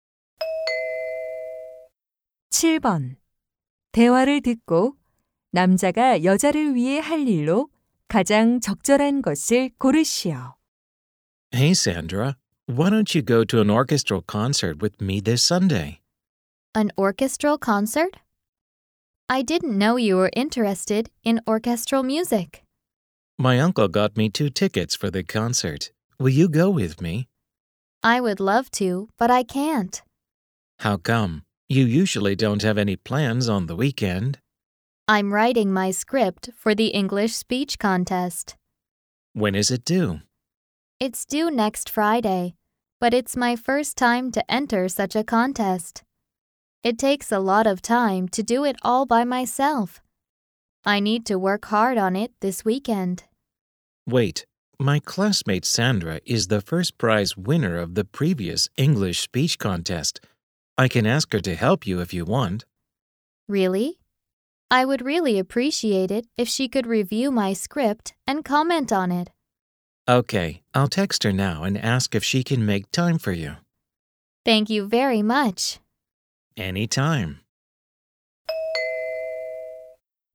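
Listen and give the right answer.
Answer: 반 친구에게 원고 검토를 부탁하는 문자 보내기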